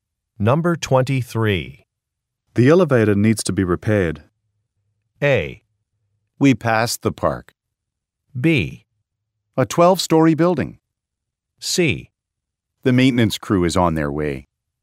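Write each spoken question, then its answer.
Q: The elevator needs to be repaired.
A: C: The maintenance crew is on their way.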